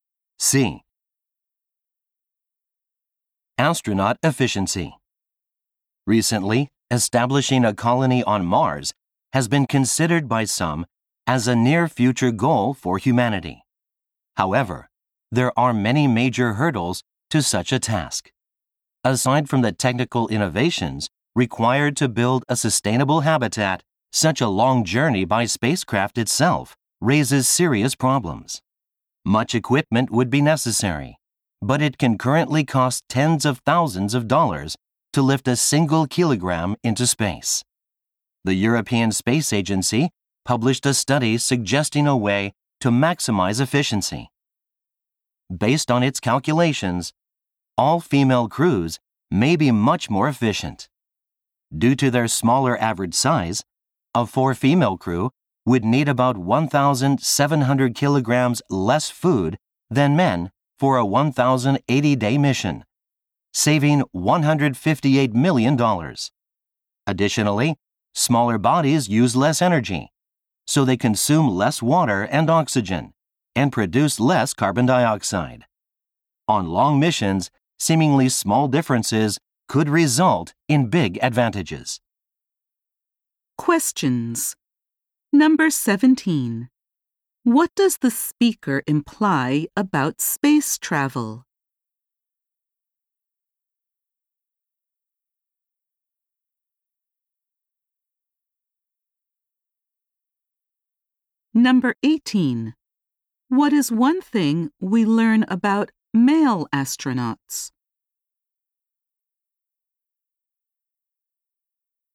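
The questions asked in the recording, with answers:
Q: What does the speaker imply about space travel?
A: Carrying equipment and supplies is very expensive.

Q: What is one thing we learn about male astronauts?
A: They need more food, water and oxygen because they are larger.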